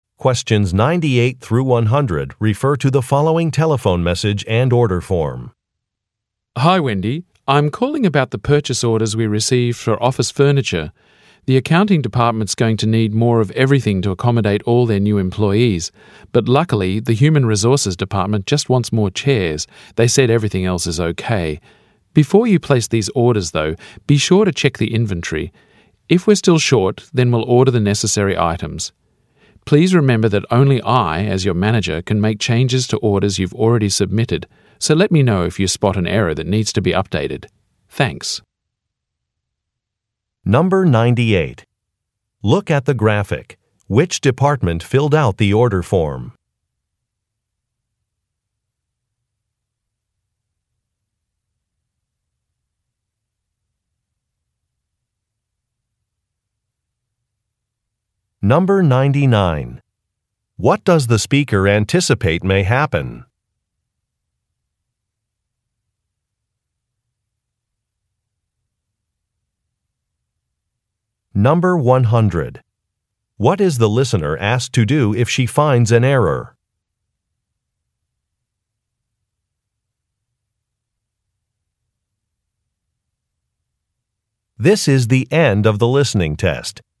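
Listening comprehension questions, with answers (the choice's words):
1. What does the speaker anticipate may happen?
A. A project may not be completed on time.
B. Some measurements may be incorrect.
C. An order may be too small.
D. There may not be enough available items.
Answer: There may not be enough available items.

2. What is the listener asked to do if she finds an error?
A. Contact her manager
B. Submit a form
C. Make a correction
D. Keep a record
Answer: Contact her manager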